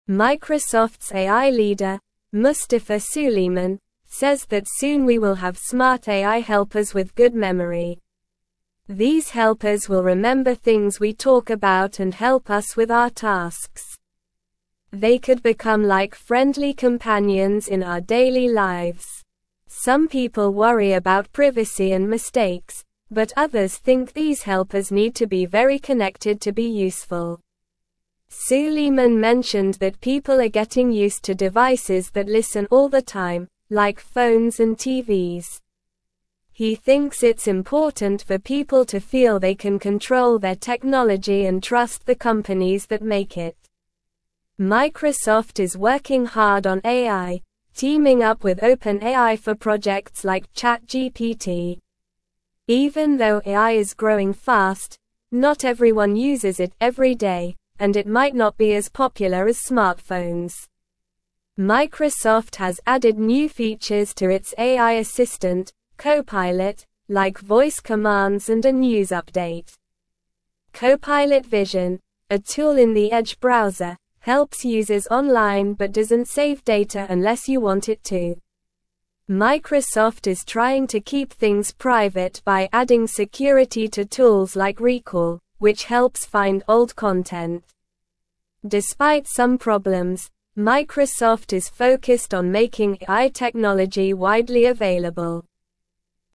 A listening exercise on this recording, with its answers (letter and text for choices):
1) What will the smart AI helpers be able to do?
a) Cook meals for us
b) Drive cars for us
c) Play music for us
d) Remember things we talk about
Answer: d) Remember things we talk about

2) What are some people worried about regarding smart AI helpers?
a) Cooking skills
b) Privacy and mistakes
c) Fashion sense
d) Sports knowledge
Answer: b) Privacy and mistakes

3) Who has Microsoft teamed up with for projects like ChatGPT?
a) Apple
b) OpenAI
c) Google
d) Facebook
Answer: b) OpenAI

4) What is one new feature added to Microsoft's AI assistant, CoPilot?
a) Voice commands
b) Cooking recipes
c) Driving directions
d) Music playlists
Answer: a) Voice commands

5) What is Microsoft focused on regarding AI technology?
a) Making it widely available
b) Keeping it a secret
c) Selling it to only a few people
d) Making it expensive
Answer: a) Making it widely available

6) They could become like (1)______ companions in our (2)______ lives.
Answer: friendly

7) They could become like (1)______ companions in our (2)______ lives.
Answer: daily

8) Some (3)______ worry about privacy and mistakes, but others think these helpers need to be very (4)______ to be useful.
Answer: people

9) Some (3)______ worry about privacy and mistakes, but others think these helpers need to be very (4)______ to be useful.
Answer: connected

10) Suleyman mentioned that people are getting used to devices that listen all the time, like (5)______ and TVs.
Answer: phones

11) He thinks it's important for people to (6)______ they can control their technology and trust the companies that make it.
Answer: feel

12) Microsoft is working hard on AI, (7)______ up with OpenAI for projects like ChatGPT.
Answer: teaming

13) (8)______ has added new features to its AI (9)______, CoPilot, like voice commands and a news update.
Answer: Microsoft

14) (8)______ has added new features to its AI (9)______, CoPilot, like voice commands and a news update.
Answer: assistant

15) CoPilot Vision, a tool in the Edge browser, helps (10)______ online but doesn't save data unless you want it to.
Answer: users

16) Microsoft is trying to keep (11)______ private by adding security to tools like Recall, which helps find old content.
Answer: things

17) Despite some problems, Microsoft is focused on (12)______ AI technology widely available.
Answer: making

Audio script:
Microsoft's AI leader, Mustafa Suleyman, says that soon we will have smart AI helpers with good memory. These helpers will remember things we talk about and help us with our tasks. They could become like friendly companions in our daily lives. Some people worry about privacy and mistakes, but others think these helpers need to be very connected to be useful.
Suleyman mentioned that people are getting used to devices that listen all the time, like phones and TVs. He thinks it's important for people to feel they can control their technology and trust the companies that make it. Microsoft is working hard on AI, teaming up with OpenAI for projects like ChatGPT. Even though AI is growing fast, not everyone uses it every day, and it might not be as popular as smartphones.
Microsoft has added new features to its AI assistant, CoPilot, like voice commands and a news update. CoPilot Vision, a tool in the Edge browser, helps users online but doesn't save data unless you want it to. Microsoft is trying to keep things private by adding security to tools like Recall, which helps find old content. Despite some problems, Microsoft is focused on making AI technology widely available.

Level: Level 2